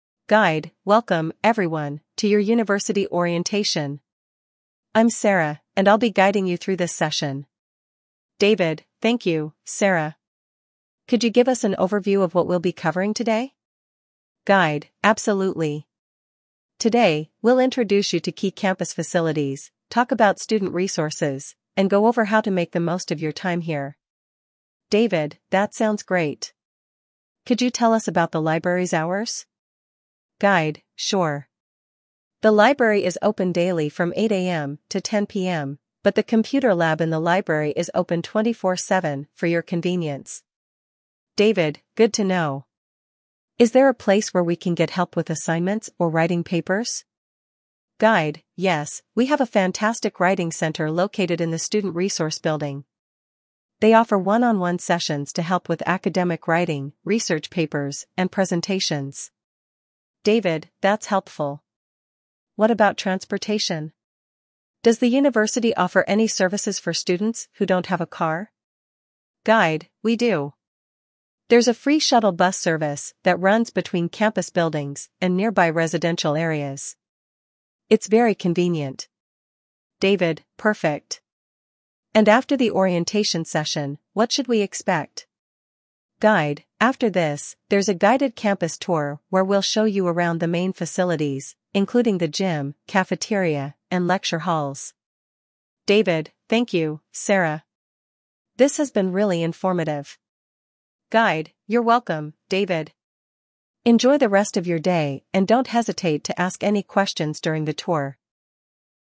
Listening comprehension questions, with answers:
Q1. What is the purpose of the orientation session?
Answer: To introduce students to the campus and its facilities

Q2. What facility is open 24/7 for student use?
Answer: The computer lab

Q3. Where can students get assistance with academic writing?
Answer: The writing center

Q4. What transportation service does the university offer?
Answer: A shuttle bus service

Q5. What is the next step after the orientation session?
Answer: A campus tour

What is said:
Guide: Welcome, everyone, to your university orientation! I'm Sarah, and I'll be guiding you through this session.
David: Thank you, Sarah. Could you give us an overview of what we'll be covering today?
Guide: Absolutely. Today, we'll introduce you to key campus facilities, talk about student resources, and go over how to make the most of your time here.
David: That sounds great. Could you tell us about the library's hours?
Guide: Sure. The library is open daily from 8 AM to 10 PM, but the computer lab in the library is open 24/7 for your convenience.
David: Good to know. Is there a place where we can get help with assignments or writing papers?
Guide: Yes, we have a fantastic writing center located in the student resource building. They offer one-on-one sessions to help with academic writing, research papers, and presentations.
David: That's helpful. What about transportation? Does the university offer any services for students who don't have a car?
Guide: We do! There's a free shuttle bus service that runs between campus buildings and nearby residential areas. It's very convenient.
David: Perfect. And after the orientation session, what should we expect?
Guide: After this, there's a guided campus tour where we'll show you around the main facilities, including the gym, cafeteria, and lecture halls.
David: Thank you, Sarah. This has been really informative.
Guide: You're welcome, David! Enjoy the rest of your day and don't hesitate to ask any questions during the tour.